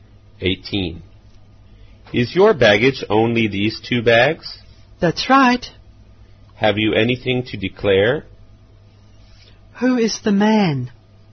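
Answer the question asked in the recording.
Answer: A customs officer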